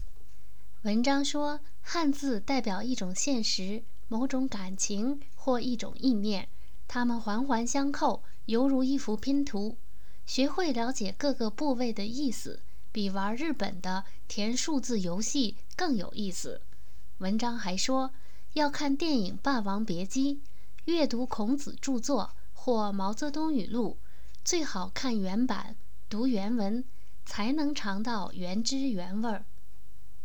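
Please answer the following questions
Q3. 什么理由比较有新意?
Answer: 汉字环环相扣,犹如一幅拼图,了解各个部位的意思比玩日本的填数字游戏更有意思

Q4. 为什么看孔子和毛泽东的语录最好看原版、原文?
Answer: 才能尝到原汁原味儿

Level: 3rd Year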